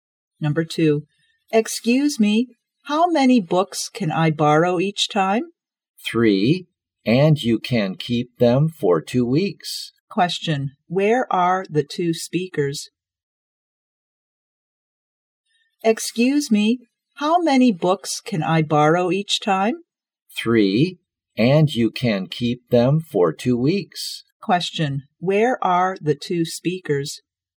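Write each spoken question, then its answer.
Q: where are the two speakers?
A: In a library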